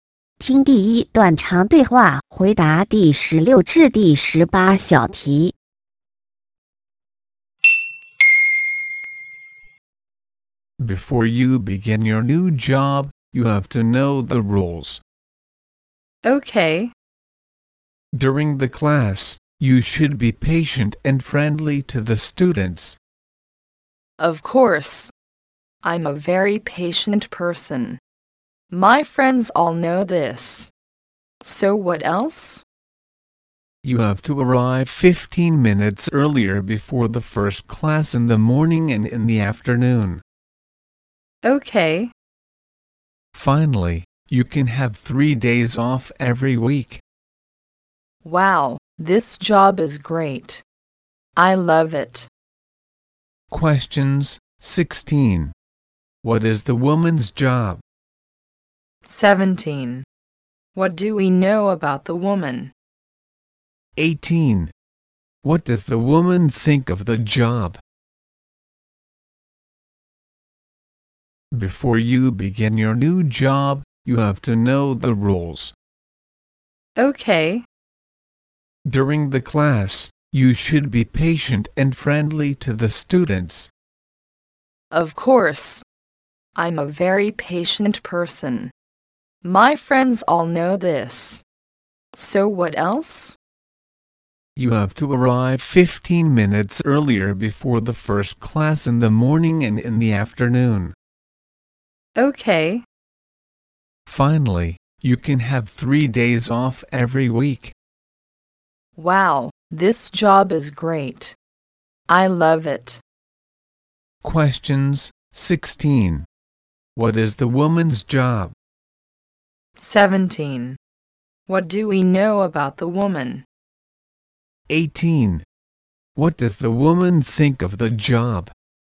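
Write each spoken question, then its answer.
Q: What does the woman think of the job?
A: It is great; she loves it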